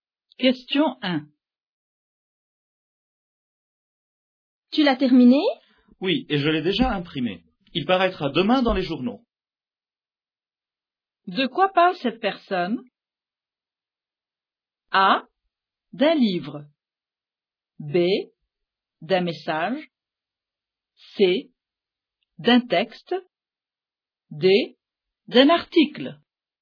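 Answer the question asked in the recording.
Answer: D: D'un article.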